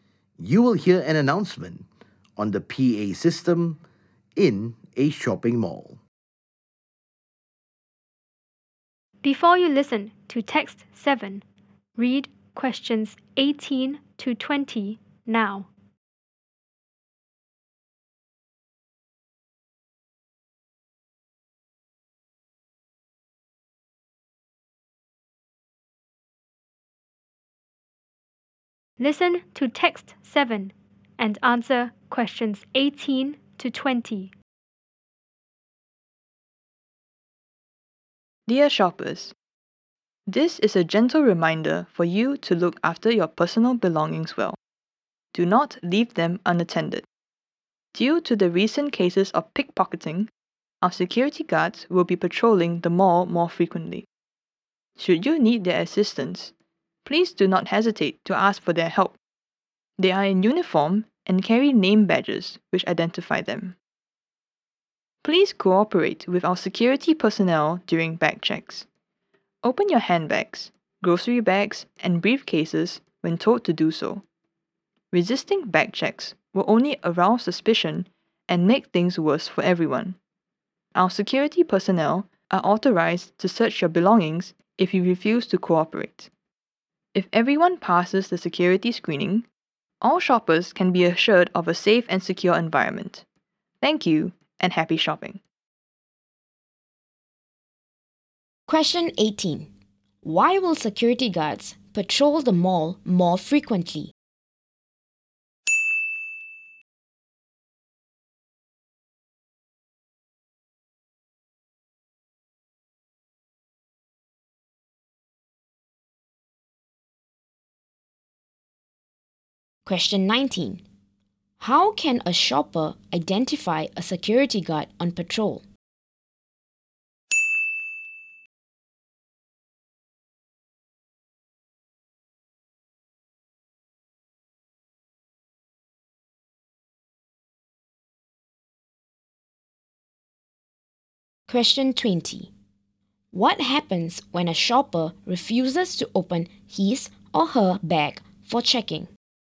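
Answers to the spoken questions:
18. Because of recent cases of pickpocketing
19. They are in uniform and carry name badges
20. Security personnel are authorized to search their belongings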